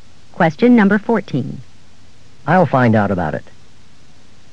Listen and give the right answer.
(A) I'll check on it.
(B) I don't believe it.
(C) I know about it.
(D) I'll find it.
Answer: (A) I'll check on it.

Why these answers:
I'll find out about it.